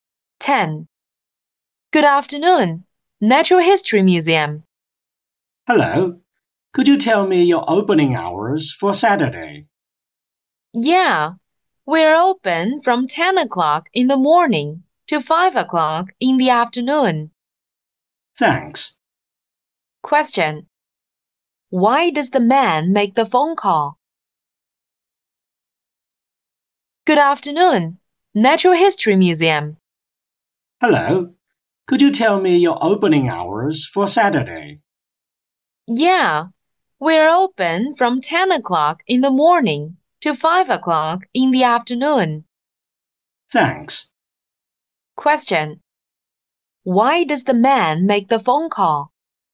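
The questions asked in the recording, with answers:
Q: Why does the man make the phone call?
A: To ask about the museum's opening hours for Saturday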